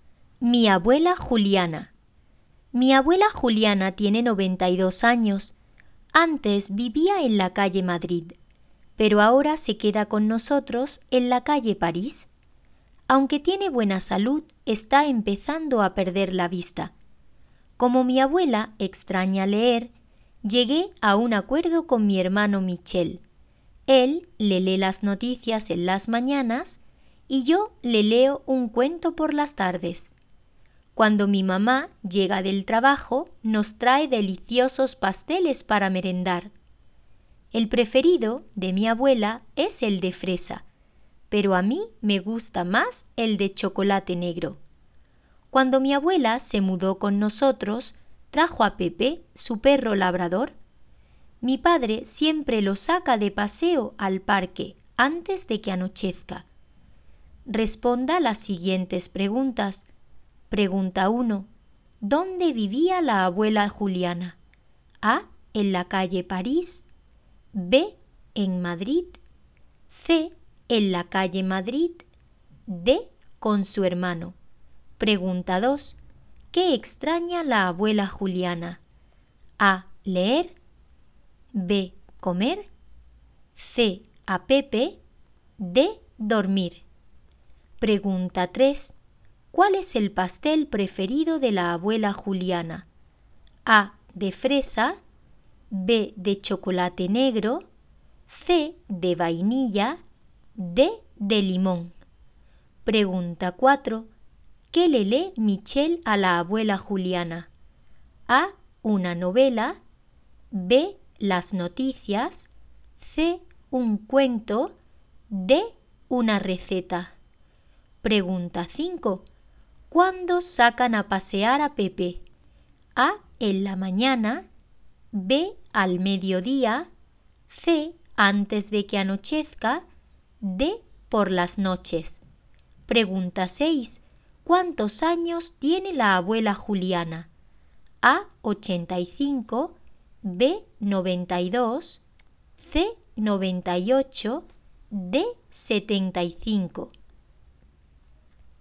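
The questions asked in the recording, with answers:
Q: ¿Dónde vivía la abuela Juliana?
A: C: En la calle Madrid

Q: ¿Qué extraña la abuela Juliana?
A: A: Leer

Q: ¿Cuál es el pastel preferido de la abuela Juliana?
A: A: De fresa

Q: ¿Qué le lee Michel a la abuela Juliana?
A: B: Las noticias

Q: ¿Cuándo sacan a pasear a Pepe?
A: C: Antes de que anochezca

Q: ¿Cuántos años tiene la abuela Juliana?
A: B: 92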